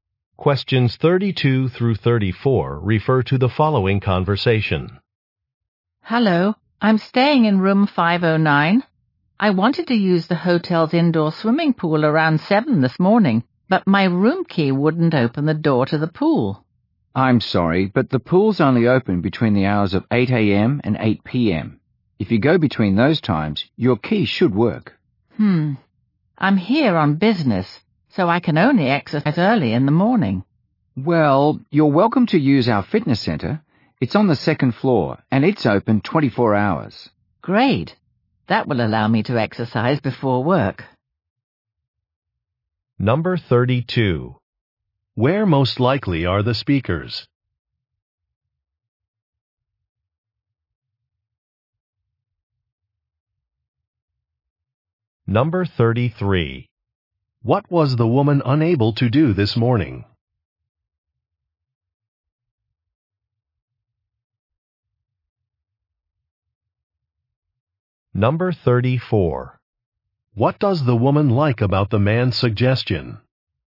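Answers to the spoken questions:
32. At a hotel
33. Get into the swimming pool (her key wouldn't open the door)
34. She can exercise before work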